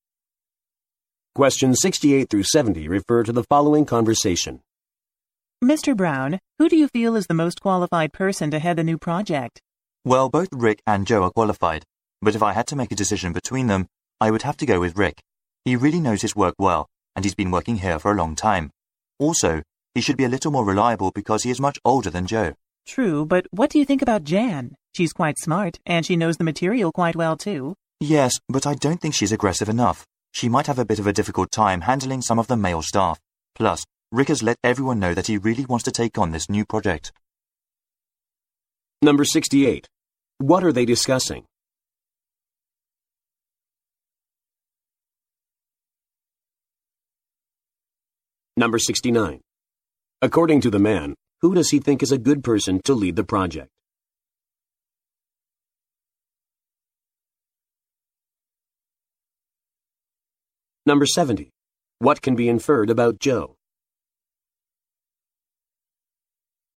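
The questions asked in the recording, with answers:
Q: What are they discussing?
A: Who should head the new project

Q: According to the man, who does he think is a good person to lead the project?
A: Rick

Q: What can be inferred about Joe?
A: He is younger than Rick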